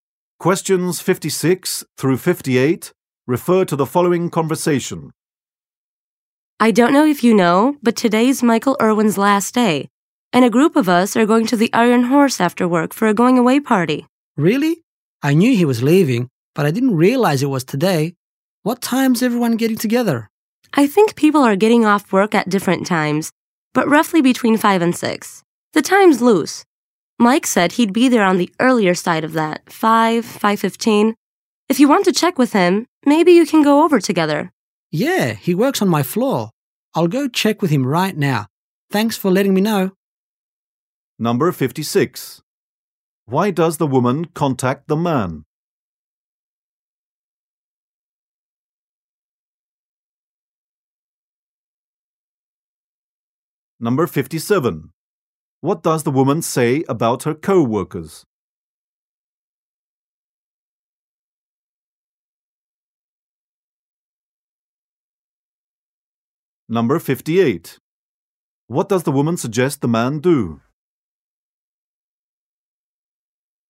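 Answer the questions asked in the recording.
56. To tell him about Michael's going-away party
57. They get off work at different times
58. Go over with Mike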